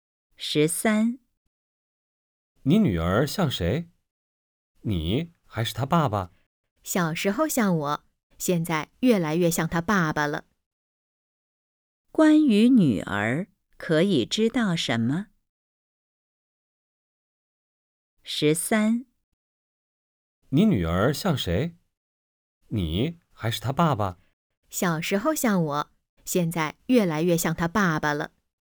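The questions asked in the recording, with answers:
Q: 关于女儿,可以知道什么?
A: 现在越来越像爸爸了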